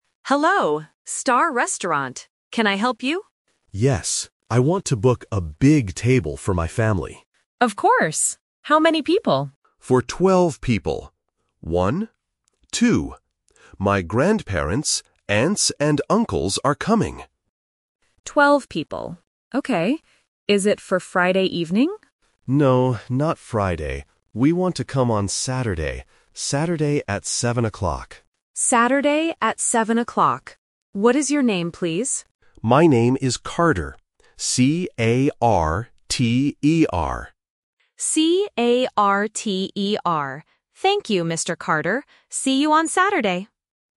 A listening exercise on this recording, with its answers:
Listen to the phone call to a restaurant. Choose the correct answer (A, B, or C) for each question.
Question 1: How many people are coming to the dinner?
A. 2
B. 12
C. 20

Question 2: What day is the family dinner?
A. Friday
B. Saturday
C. Sunday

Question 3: What is the customer's name?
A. Carter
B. Carver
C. Parker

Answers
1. B
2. B
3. A

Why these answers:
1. The customer says, "For twelve people," and repeats the numbers "One-two" to be clear. Option C (20) is a phonetic trap because "twelve" and "twenty" can sound confusing for beginners. Option A (2) is just a plausible number trap.
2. The receptionist asks, "Is it for Friday evening?" (Option A is the trap). The customer says, "No, not Friday. We want to come on Saturday." Option C (Sunday) is a weekend day but is never mentioned.
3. The customer spells his name clearly: C-A-R-T-E-R. Option B (Carver) and Option C (Parker) are traps because they sound very similar to Carter, testing if the listener caught the exact spelling.

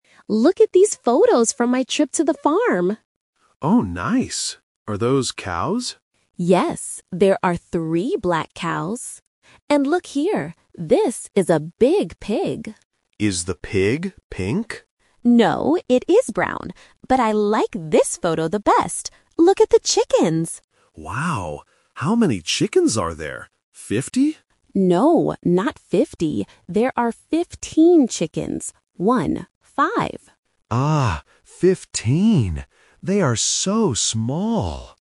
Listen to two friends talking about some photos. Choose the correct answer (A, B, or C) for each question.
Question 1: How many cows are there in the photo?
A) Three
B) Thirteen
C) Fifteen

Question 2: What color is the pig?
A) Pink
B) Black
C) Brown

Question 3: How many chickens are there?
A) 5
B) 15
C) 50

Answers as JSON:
{"1": "A", "2": "C", "3": "B"}

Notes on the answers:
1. Alice clearly says, "there are three black cows." Option C (Fifteen) is a trap because it is the number of chickens, not cows. Option B (Thirteen) is a similar-sounding number but is not mentioned.
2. Ben asks if the pig is pink, but Alice says, "No, it is brown." Option A (Pink) is the trap because Ben asks about it. Option B (Black) is the color of the cows.
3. Ben asks if there are fifty (50) chickens, but Alice corrects him: "No, not fifty. There are fifteen chickens. One, five." Option C (50) is the trap based on similar sounds (fifteen vs. fifty). Option A (5) is just a distractor.

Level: A1

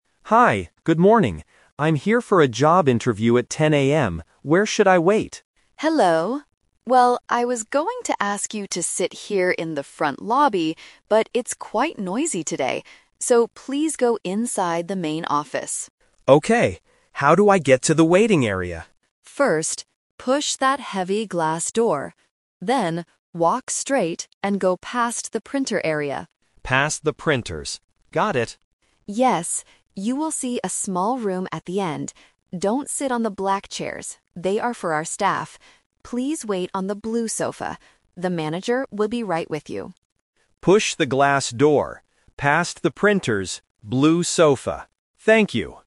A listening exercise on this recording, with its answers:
Listen to the conversation between a job candidate and an HR specialist. Choose the correct answer (A, B, or C) for each question.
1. Why doesn't the candidate wait in the front lobby?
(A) Because it is closed today.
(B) Because it is quite noisy.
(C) Because there are no chairs.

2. Which area does the candidate need to walk past?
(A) The manager's office.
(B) The printer area.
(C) The glass door.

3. Where should the candidate sit?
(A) On the blue sofa.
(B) On the black chairs.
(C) In the front lobby.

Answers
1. B
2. B
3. A

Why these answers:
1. The Key: The HR specialist explains the situation (The Twist): "I was going to ask you to sit here... but it's quite noisy today." The Trap: Options (A) and (C) are plausible reasons in a real-life situation but are completely unmentioned in the audio.
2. The Key: The HR gives a direct instruction to "go past the printer area." The Trap: Option (C) is a trap because the candidate has to push and go through the glass door, not walk past it. Option (A) uses the word "manager" which is mentioned at the end, but not as a place to walk past.
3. The Key: The HR explicitly says, "Please wait on the blue sofa." The Trap: Option (B) is a direct trap. The black chairs are mentioned, but the HR warns: "Don't sit on the black chairs." Option (C) was the original, canceled plan.

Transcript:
Candidate: Hi, good morning. I'm here for a job interview at 10 AM. Where should I wait?
HR Specialist: Hello! Well, I was going to ask you to sit here in the front lobby, but it's quite noisy today. So, please go inside the main office.
Candidate: Okay. How do I get to the waiting area?
HR Specialist: First, push that heavy glass door. Then, walk straight and go past the printer area.
Candidate: Past the printers. Got it.
HR Specialist: Yes. You will see a small room at the end. Don't sit on the black chairs; they are for our staff. Please wait on the blue sofa. The manager will be right with you.
Candidate: Push the glass door, past the printers, blue sofa. Thank you!

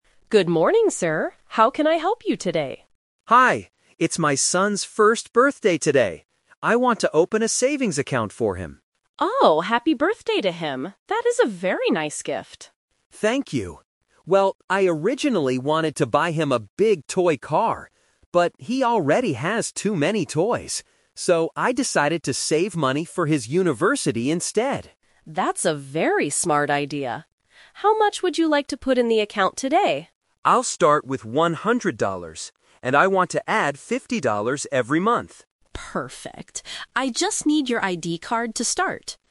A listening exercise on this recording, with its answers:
Listen to a conversation between a father and a bank teller. For each question, choose the correct answer (A, B, or C).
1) What is the father giving his son for his birthday?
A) A big toy car.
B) A savings account.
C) A new ID card.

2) Why did the father change his mind about the gift?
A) Because the toy was too expensive.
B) Because his son already has lots of toys.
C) Because his son is going to university soon.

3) How much money will the father add to the account every month?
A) 50 dollars.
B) 100 dollars.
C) 150 dollars.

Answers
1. B
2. B
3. A

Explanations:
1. The father says he "originally wanted to buy him a big toy car" (Option A - Trap). However, he changed his mind and says, "So, I decided to save money... instead" by opening a savings account (Option B - Key). Option C is a trap because the ID card is what the bank teller asks for at the end.
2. The father explicitly states, "But, he already has too many toys" (Option B - Key). Option A is a plausible guess but is not mentioned. Option C is a trap; he is saving for university, but his son is only one year old ("first birthday"), so he is not going to university soon.
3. The father says, "I want to add 50 dollars every month" (Option A - Key). Option B (100 dollars) is a number trap; that is the amount he is putting in today to start the account, not the monthly amount.

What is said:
Bank Teller: Good morning, sir. How can I help you today?
Father: Hi. It's my son's first birthday today! I want to open a savings account for him.
Bank Teller: Oh, happy birthday to him! That is a very nice gift.
Father: Thank you. Well, I originally wanted to buy him a big toy car. But, he already has too many toys. So, I decided to save money for his university instead.
Bank Teller: That's a very smart idea. How much would you like to put in the account today?
Father: I'll start with 100 dollars. And I want to add 50 dollars every month.
Bank Teller: Perfect. I just need your ID card to start.

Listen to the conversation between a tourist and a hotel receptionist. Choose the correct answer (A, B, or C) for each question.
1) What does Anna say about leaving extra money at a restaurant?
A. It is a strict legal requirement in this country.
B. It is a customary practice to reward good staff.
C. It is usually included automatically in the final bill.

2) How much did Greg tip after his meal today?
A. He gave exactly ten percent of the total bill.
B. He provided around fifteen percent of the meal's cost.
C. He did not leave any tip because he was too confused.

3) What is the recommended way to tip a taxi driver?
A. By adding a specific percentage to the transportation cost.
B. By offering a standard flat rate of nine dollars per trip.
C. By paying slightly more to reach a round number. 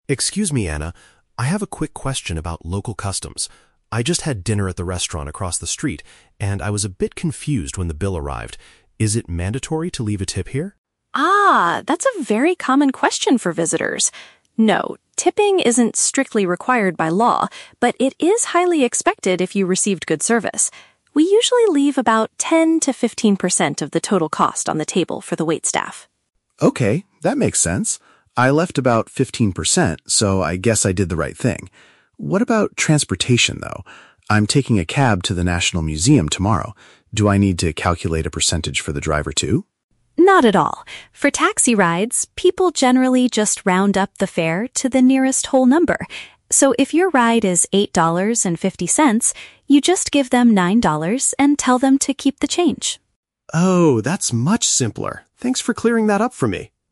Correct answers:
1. B
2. B
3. C

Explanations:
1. Anna says tipping is "highly expected if you received good service" (a customary practice to reward good staff). Option (A) is a trap; she explicitly says tipping is "isn't strictly required by law". Option (C) is a plausible practice in some European countries, but it is never mentioned in this conversation.
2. Greg says, "I left about fifteen percent" (provided around fifteen percent). Option (A) is a trap; Anna mentions "ten to fifteen percent" as the general rule, but Greg specifically chose fifteen. Option (C) is a trap; he admits he was "confused" earlier, but he still left a tip.
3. Anna says people "round up the fare to the nearest whole number" (pay slightly more to reach a round number). Option (A) is a trap; Greg asks if he needs to "calculate a percentage", and Anna says "Not at all". Option (B) is a trap; nine dollars was just an example she gave for an $8.50 ride, not a standard flat rate.

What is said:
Greg: Excuse me, Anna. I have a quick question about local customs. I just had dinner at the restaurant across the street, and I was a bit confused when the bill arrived. Is it mandatory to leave a tip here?
Anna: Ah, that's a very common question for visitors! No, tipping isn't strictly required by law, but it is highly expected if you received good service. We usually leave about ten to fifteen percent of the total cost on the table for the waitstaff.
Greg: Okay, that makes sense. I left about fifteen percent, so I guess I did the right thing. What about transportation, though? I'm taking a cab to the national museum tomorrow. Do I need to calculate a percentage for the driver too?
Anna: Not at all. For taxi rides, people generally just round up the fare to the nearest whole number.

